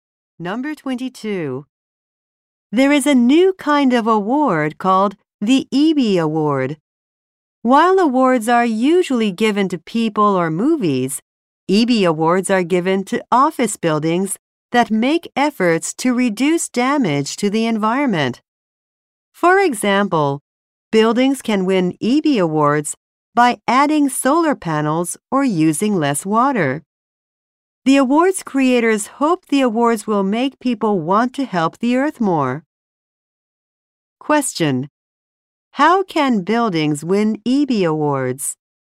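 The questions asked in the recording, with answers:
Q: How can buildings win Ebby Awards?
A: By reducing environmental damage, such as adding solar panels or using less water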